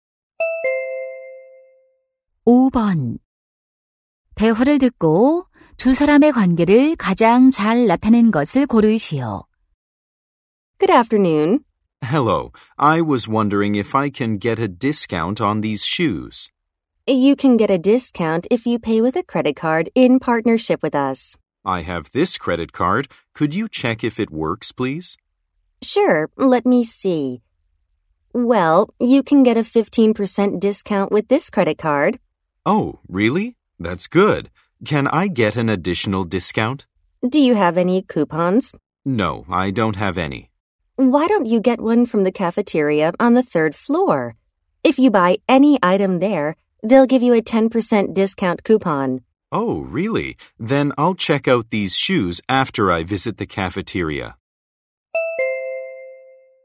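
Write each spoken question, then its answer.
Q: 대화를 듣고 두 사람의 관계를 가장 잘 나타낸 것을 고르시오.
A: 손님과 신발 매장 점원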